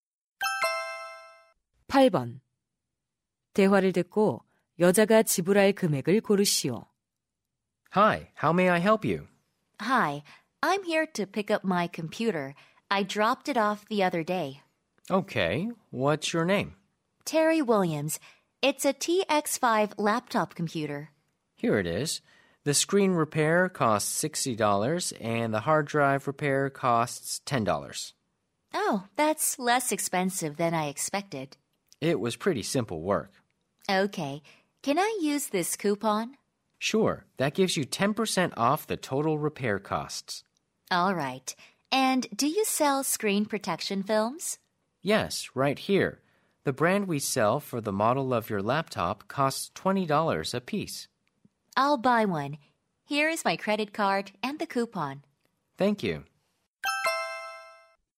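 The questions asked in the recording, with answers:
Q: 대화를 듣고 여자가 지불할 금액을 고르시오.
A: $83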